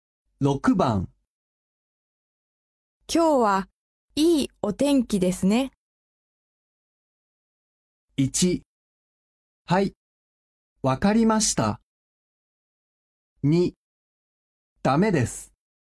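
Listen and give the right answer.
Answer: 3: そうですね、本当にいいお天気ですね。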